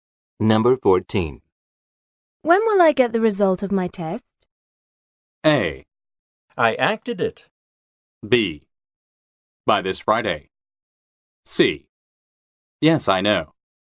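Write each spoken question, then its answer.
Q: When will I get the result of my test?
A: B: By this Friday.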